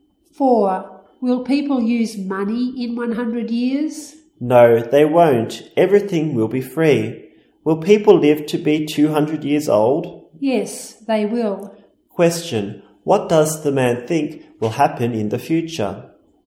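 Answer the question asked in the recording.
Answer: People won't use money and will live to be 200 years old.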